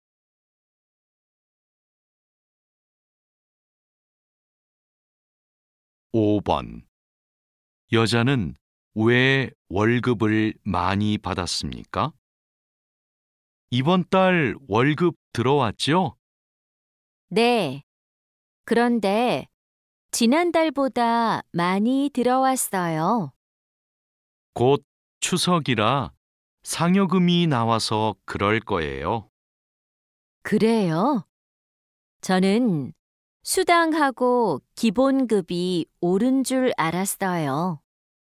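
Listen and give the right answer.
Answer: 추석이라 상여금이 나와서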